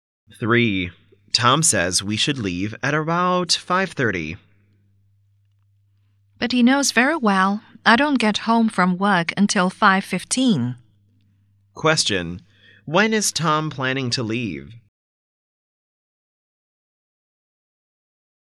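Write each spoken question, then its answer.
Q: When is Tom planning to leave?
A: At about 5:30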